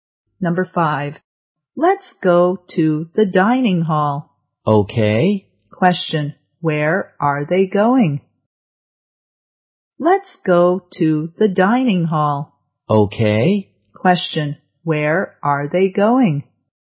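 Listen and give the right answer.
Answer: The dining hall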